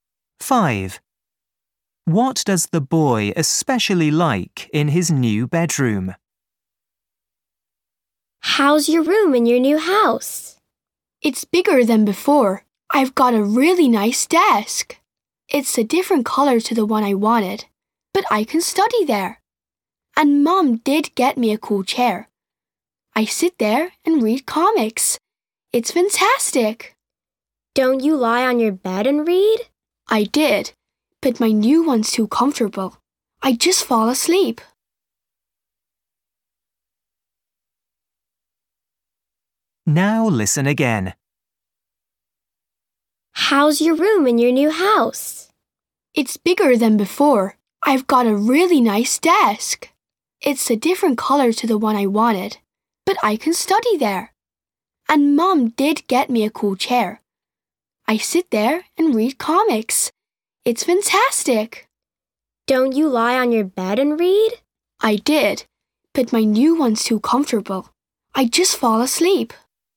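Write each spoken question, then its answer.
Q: What does the boy especially like in his new bedroom?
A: his new chair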